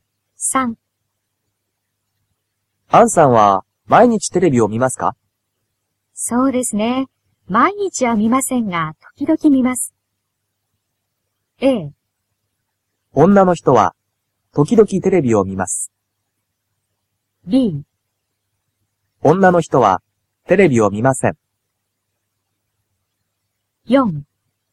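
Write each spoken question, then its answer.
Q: アンさんは毎日テレビを見ますか?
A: A: 女の人は時々テレビを見ます。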